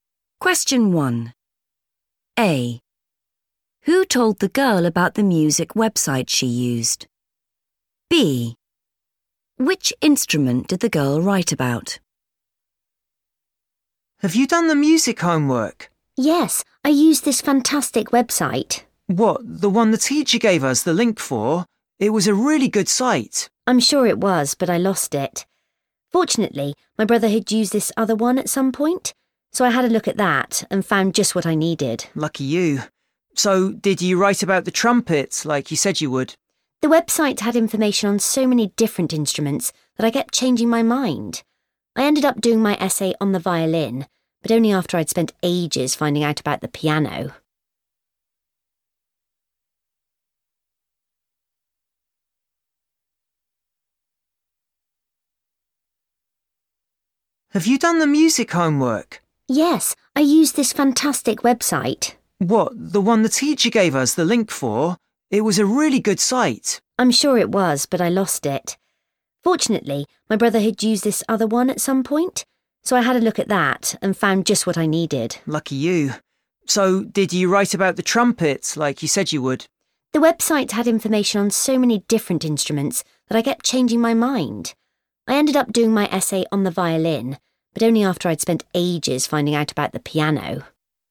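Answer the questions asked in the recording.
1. her brother
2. the violin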